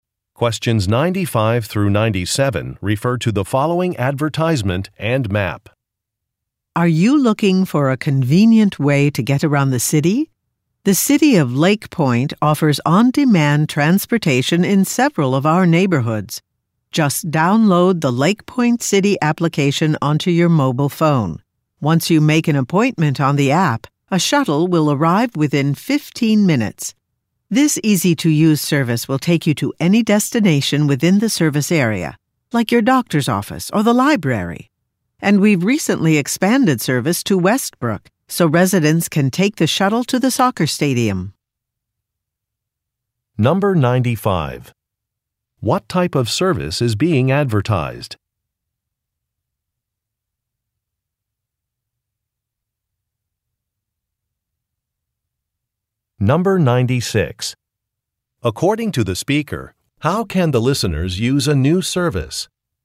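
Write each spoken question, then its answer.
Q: What type of service is being advertised?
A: On-demand transportation (a shuttle service)

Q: According to the speaker, how can the listeners use a new service?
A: By downloading the Lake Point City app and booking on it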